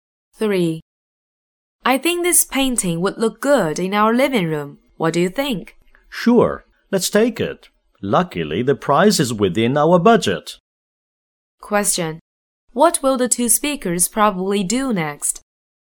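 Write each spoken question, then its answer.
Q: What will the two speakers probably do next?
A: Buy the painting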